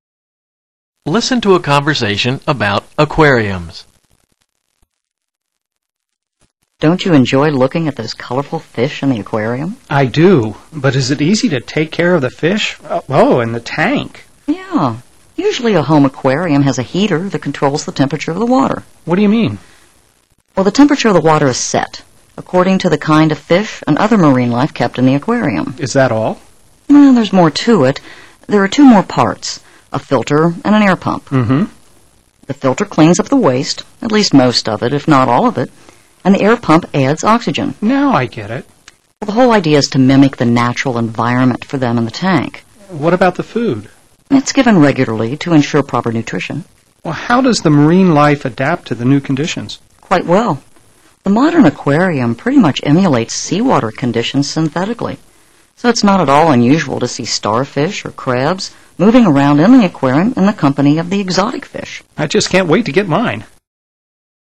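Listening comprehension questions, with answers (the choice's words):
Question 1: What produces additional oxygen?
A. Air pump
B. Filter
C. Heater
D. Water purifiers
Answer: Air pump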